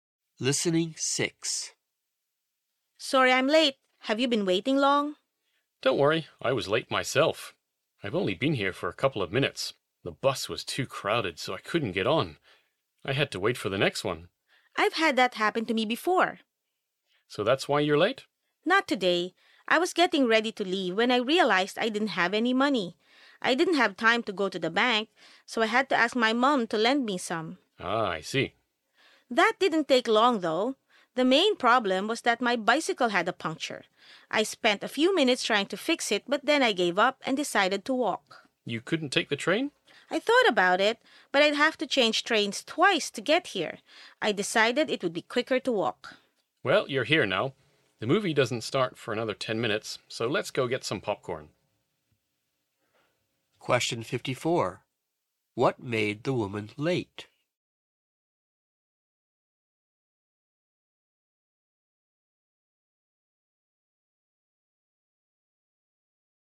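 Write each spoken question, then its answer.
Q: What made the woman late?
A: Her bicycle had a puncture, so she had to walk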